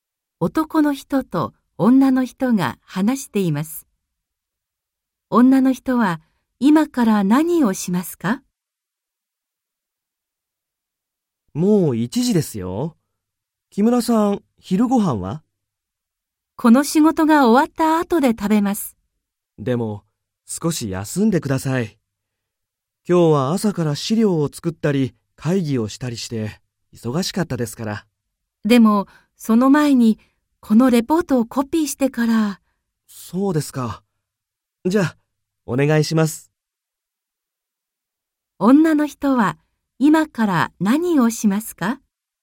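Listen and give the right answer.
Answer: レポートをコピーする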